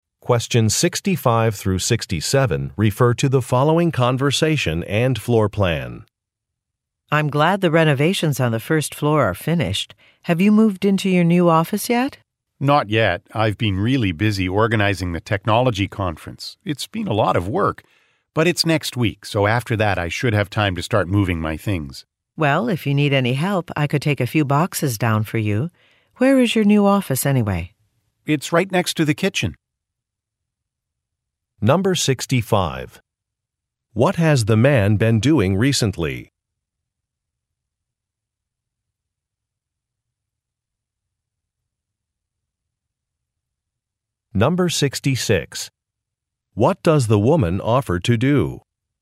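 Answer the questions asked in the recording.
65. Organizing a technology conference
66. Take some boxes down for him (help him move)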